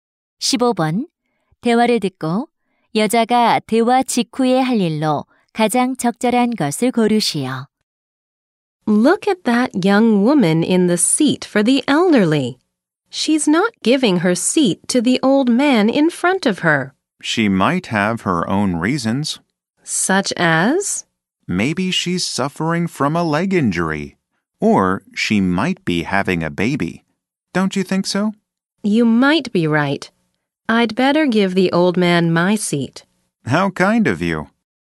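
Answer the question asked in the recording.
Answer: 노인에게 자리 양보하기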